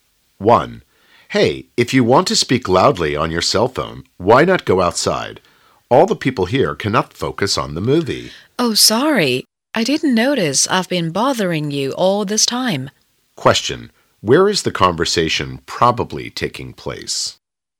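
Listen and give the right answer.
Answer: In a cinema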